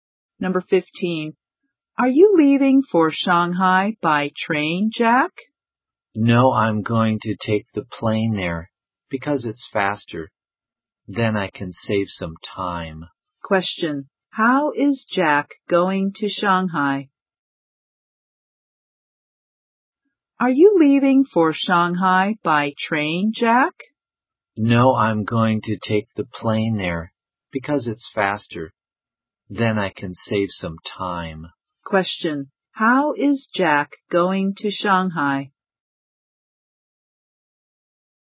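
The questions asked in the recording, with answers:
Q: Question. How is Jack going to Shanghai?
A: By plane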